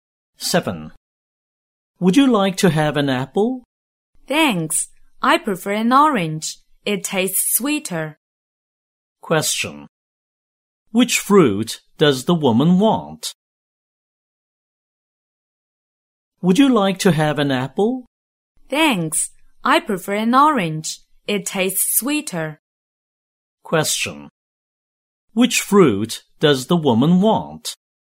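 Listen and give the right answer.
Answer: An orange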